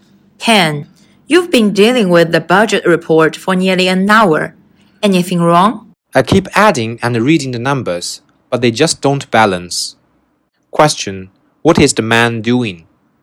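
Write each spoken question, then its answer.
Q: What is the man doing?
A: Checking the numbers in the budget report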